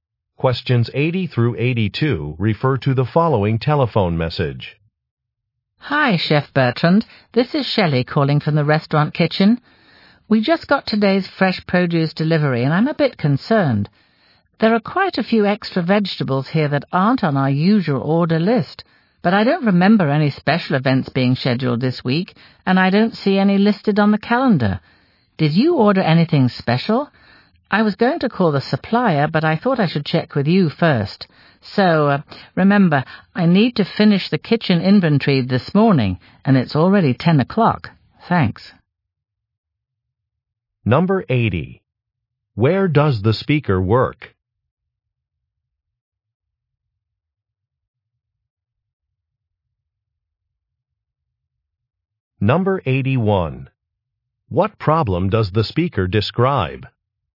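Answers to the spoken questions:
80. At a restaurant
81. A delivery included extra vegetables that weren't ordered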